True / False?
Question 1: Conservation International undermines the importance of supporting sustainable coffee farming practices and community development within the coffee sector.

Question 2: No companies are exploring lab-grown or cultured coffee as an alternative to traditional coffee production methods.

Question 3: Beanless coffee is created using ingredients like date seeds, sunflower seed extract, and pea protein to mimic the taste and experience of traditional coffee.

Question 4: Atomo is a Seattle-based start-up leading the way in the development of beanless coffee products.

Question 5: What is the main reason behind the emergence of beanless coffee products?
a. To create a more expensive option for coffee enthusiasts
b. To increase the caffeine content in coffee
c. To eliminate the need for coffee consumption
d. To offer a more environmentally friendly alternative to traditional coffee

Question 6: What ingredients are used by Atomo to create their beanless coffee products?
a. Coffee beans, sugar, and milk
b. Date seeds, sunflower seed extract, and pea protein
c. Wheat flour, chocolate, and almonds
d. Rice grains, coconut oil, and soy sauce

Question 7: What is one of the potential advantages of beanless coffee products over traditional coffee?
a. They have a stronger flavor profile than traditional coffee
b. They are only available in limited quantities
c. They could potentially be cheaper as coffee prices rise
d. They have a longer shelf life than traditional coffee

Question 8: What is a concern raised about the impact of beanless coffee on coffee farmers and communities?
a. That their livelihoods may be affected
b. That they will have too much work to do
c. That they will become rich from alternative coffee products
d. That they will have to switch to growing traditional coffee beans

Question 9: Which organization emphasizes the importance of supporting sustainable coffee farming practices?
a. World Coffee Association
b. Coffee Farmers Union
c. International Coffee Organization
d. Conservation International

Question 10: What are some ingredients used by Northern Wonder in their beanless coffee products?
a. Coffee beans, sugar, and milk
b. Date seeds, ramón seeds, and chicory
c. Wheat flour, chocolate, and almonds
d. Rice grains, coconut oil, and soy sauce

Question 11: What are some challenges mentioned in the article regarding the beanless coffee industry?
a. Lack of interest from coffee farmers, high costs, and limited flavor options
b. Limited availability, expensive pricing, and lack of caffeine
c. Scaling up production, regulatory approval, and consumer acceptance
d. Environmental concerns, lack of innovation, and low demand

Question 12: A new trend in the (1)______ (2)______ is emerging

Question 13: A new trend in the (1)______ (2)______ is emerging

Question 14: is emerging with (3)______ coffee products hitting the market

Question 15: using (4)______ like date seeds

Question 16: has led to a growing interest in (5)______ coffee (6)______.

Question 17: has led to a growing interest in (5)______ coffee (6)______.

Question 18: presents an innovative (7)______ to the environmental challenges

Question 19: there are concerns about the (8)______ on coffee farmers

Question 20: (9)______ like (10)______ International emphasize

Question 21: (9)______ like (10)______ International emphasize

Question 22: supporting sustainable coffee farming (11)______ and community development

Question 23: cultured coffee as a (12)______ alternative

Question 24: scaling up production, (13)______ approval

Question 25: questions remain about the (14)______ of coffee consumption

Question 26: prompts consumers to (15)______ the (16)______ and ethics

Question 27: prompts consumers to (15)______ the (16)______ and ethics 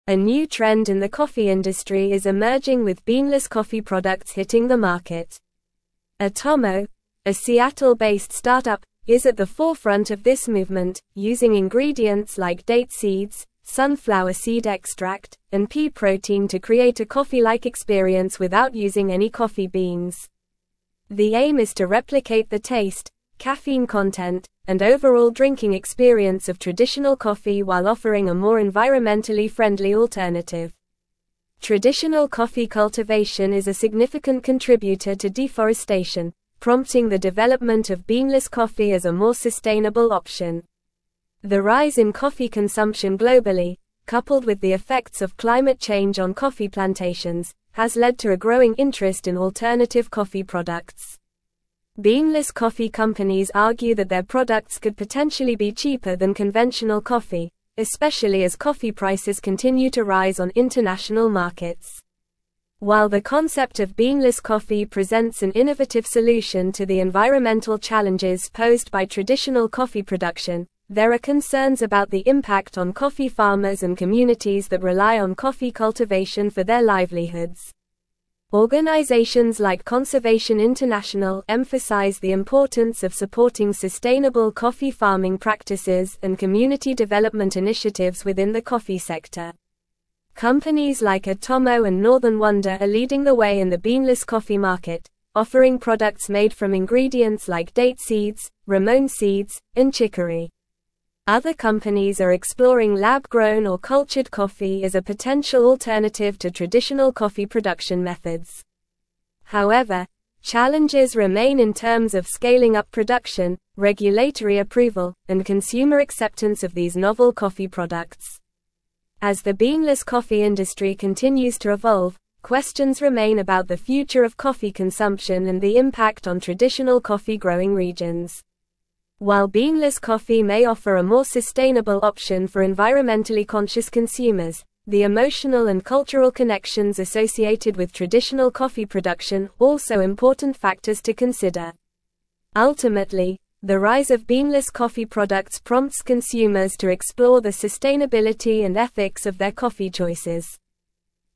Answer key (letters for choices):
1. False
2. False
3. True
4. True
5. d
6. b
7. c
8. a
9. d
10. b
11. c
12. coffee
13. industry
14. beanless
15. ingredients
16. alternative
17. products
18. solution
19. impact
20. Organizations
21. Conservation
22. practices
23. potential
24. regulatory
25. future
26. explore
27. sustainability

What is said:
A new trend in the coffee industry is emerging with beanless coffee products hitting the market. Atomo, a Seattle-based start-up, is at the forefront of this movement, using ingredients like date seeds, sunflower seed extract, and pea protein to create a coffee-like experience without using any coffee beans. The aim is to replicate the taste, caffeine content, and overall drinking experience of traditional coffee while offering a more environmentally friendly alternative.
Traditional coffee cultivation is a significant contributor to deforestation, prompting the development of beanless coffee as a more sustainable option. The rise in coffee consumption globally, coupled with the effects of climate change on coffee plantations, has led to a growing interest in alternative coffee products. Beanless coffee companies argue that their products could potentially be cheaper than conventional coffee, especially as coffee prices continue to rise on international markets.
While the concept of beanless coffee presents an innovative solution to the environmental challenges posed by traditional coffee production, there are concerns about the impact on coffee farmers and communities that rely on coffee cultivation for their livelihoods. Organizations like Conservation International emphasize the importance of supporting sustainable coffee farming practices and community development initiatives within the coffee sector.
Companies like Atomo and Northern Wonder are leading the way in the beanless coffee market, offering products made from ingredients like date seeds, ramón seeds, and chicory. Other companies are exploring lab-grown or cultured coffee as a potential alternative to traditional coffee production methods. However, challenges remain in terms of scaling up production, regulatory approval, and consumer acceptance of these novel coffee products.
As the beanless coffee industry continues to evolve, questions remain about the future of coffee consumption and the impact on traditional coffee-growing regions. While beanless coffee may offer a more sustainable option for environmentally conscious consumers, the emotional and cultural connections associated with traditional coffee production are also important factors to consider. Ultimately, the rise of beanless coffee products prompts consumers to explore the sustainability and ethics of their coffee choices.

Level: Level 4